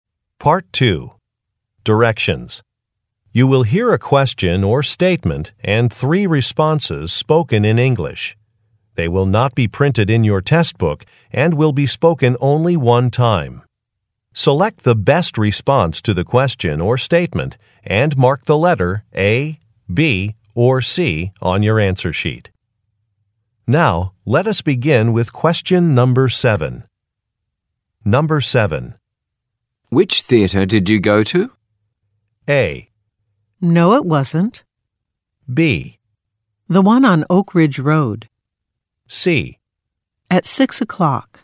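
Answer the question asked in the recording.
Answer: The one on Oak Ridge Road.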